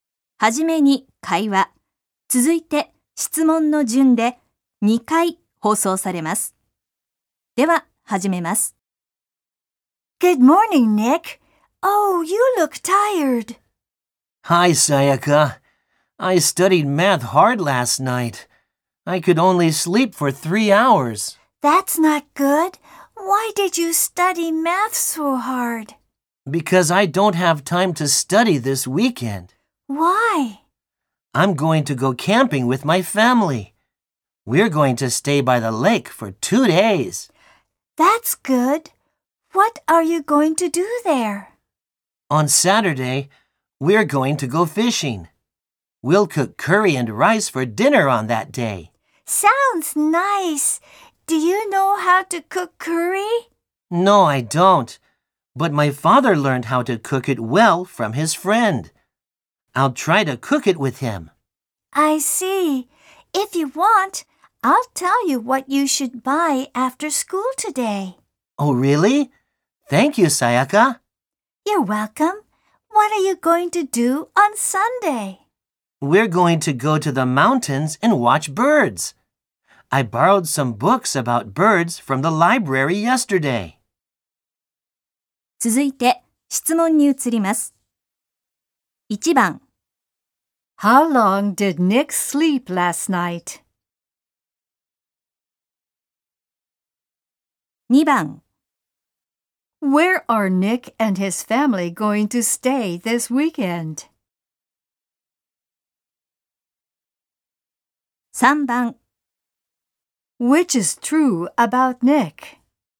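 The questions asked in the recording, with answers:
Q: How long did Nick sleep last night?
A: For three hours.

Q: Where are Nick and his family going to stay this weekend?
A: By the lake.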